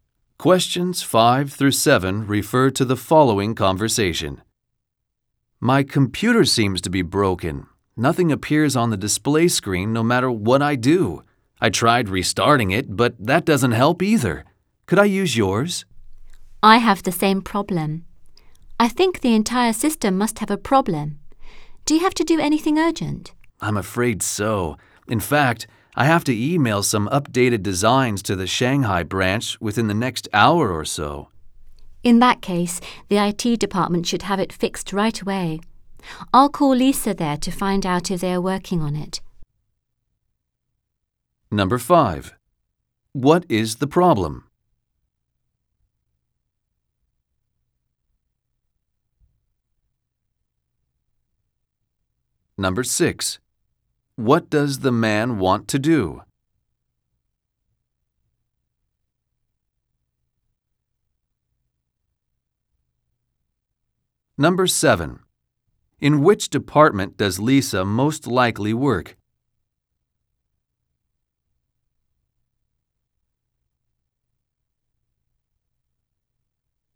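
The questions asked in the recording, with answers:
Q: What is the problem?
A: The computer system is not working (nothing appears on the screen).

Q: What does the man want to do?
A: Email updated designs to the Shanghai branch.

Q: In which department does Lisa most likely work?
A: The IT department.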